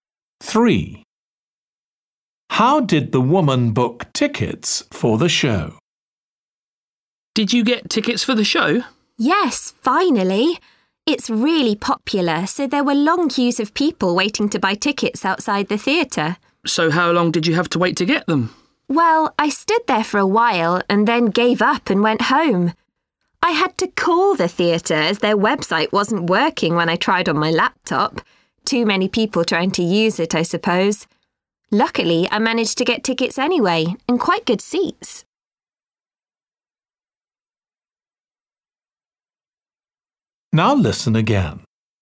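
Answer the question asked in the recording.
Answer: by phone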